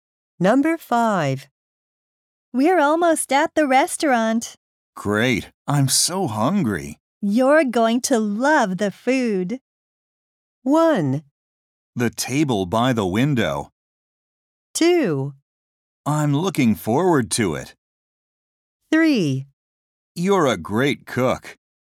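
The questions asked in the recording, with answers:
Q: You're going to love the food.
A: 2: I'm looking forward to it.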